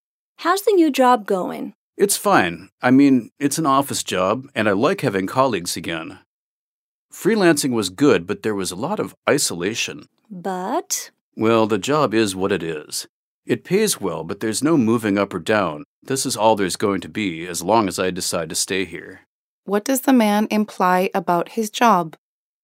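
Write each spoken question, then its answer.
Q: What does the man imply about his job?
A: It offers no chance of promotion or advancement, though it pays well.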